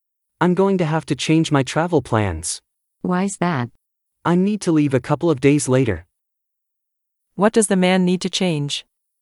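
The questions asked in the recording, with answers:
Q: What does the man need to change?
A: His travel plans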